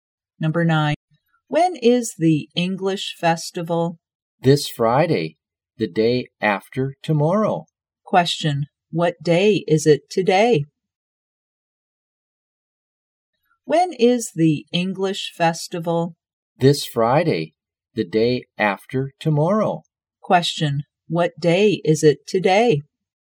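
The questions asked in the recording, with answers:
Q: What day is it today?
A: Wednesday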